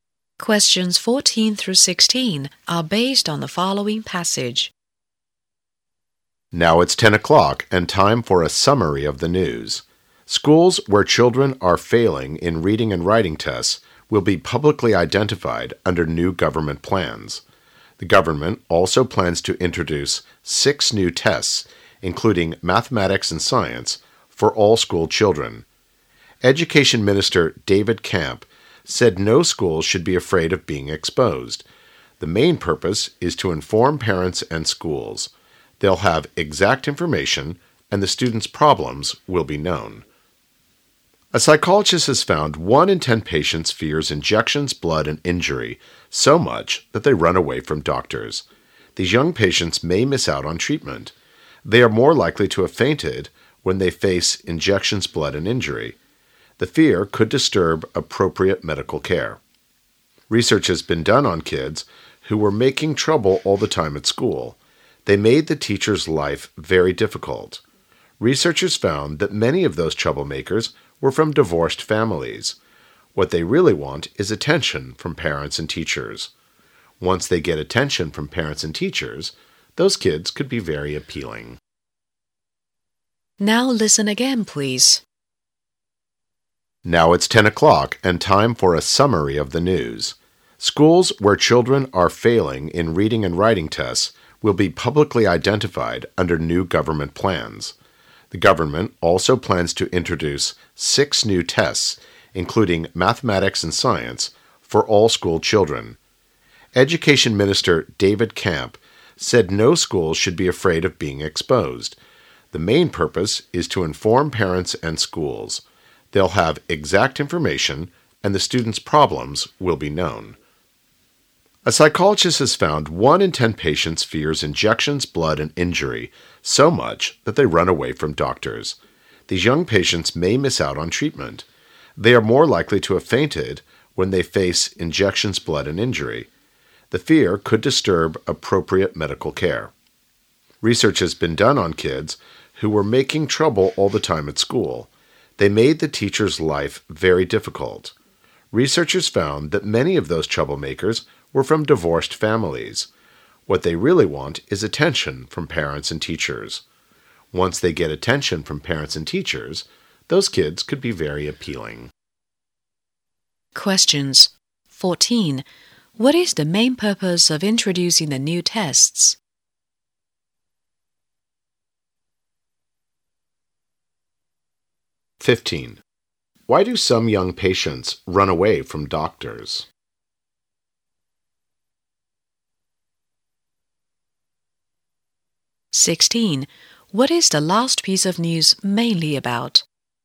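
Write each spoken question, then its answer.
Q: What is the main purpose of introducing the new tests?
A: To inform parents and schools

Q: Why do some young patients run away from doctors?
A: They fear injections, blood and injury

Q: What is the last piece of news mainly about?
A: Troublemaking kids, often from divorced families, who want attention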